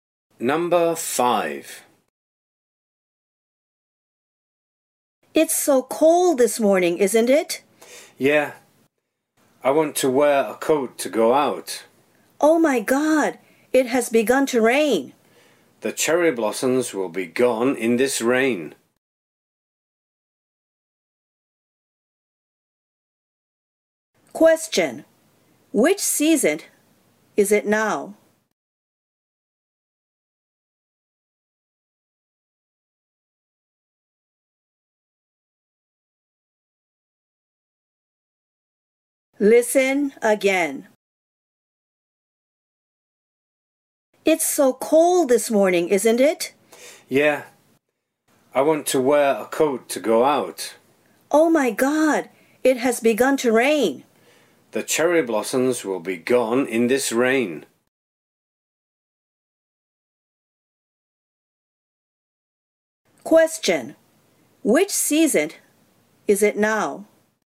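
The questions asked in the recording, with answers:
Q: Question. Which season is it now?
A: Spring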